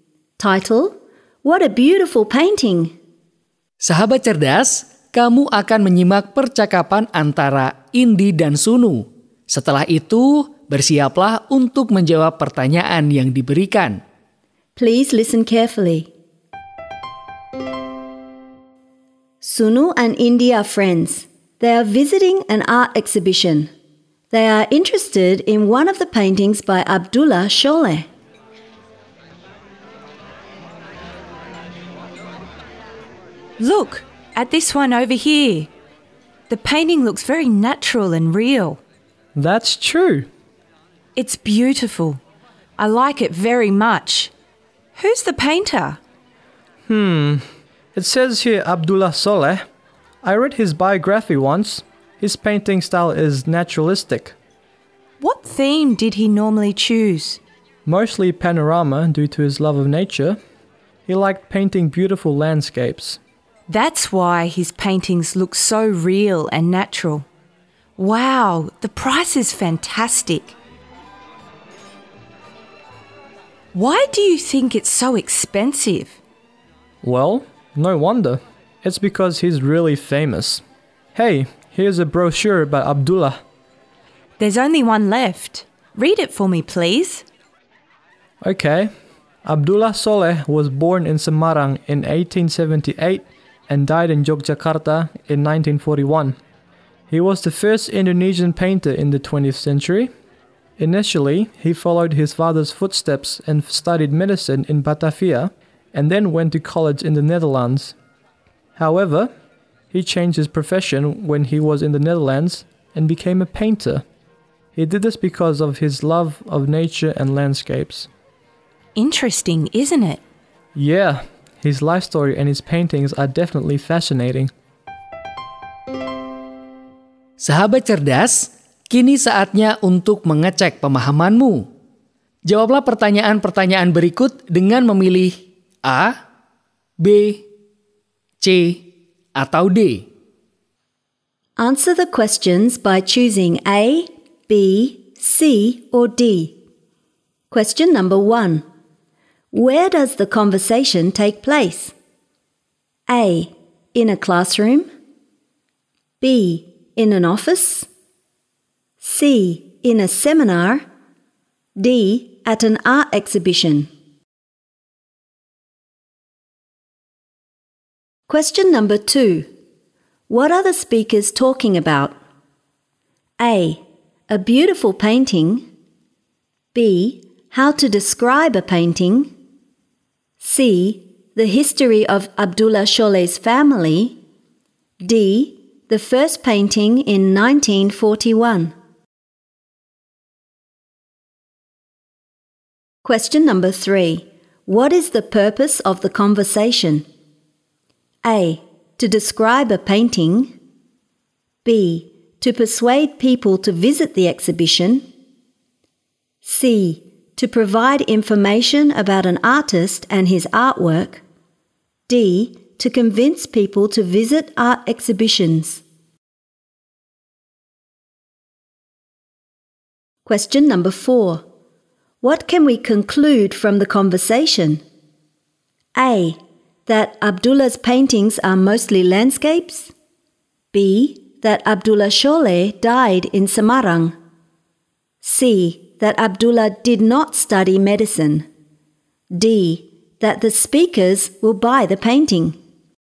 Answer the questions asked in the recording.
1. D. At an art exhibition.
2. A. A beautiful painting.
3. C. To provide information about an artist and his artwork.
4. A. That Abdullah's paintings are mostly landscapes.